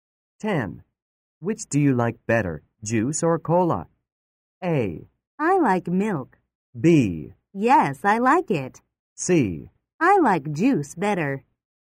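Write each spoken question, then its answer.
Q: Which do you like better, juice or cola?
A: C: I like juice better.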